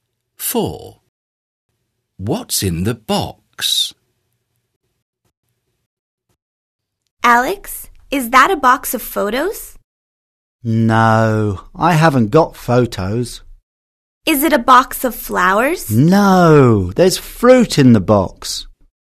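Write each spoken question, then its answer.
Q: What's in the box?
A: fruit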